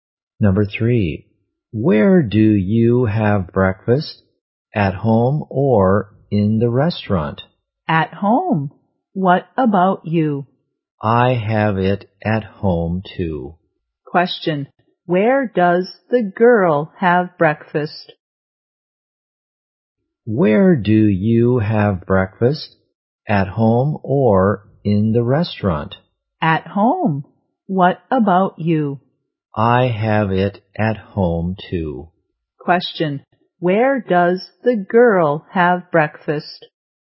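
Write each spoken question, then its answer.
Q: where does the girl have breakfast?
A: At home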